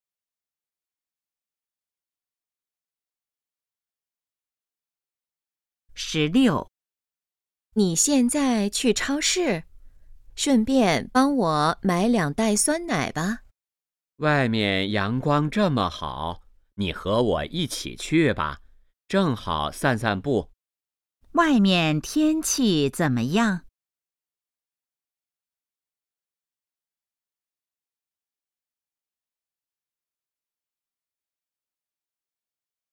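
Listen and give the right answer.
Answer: 阳光很好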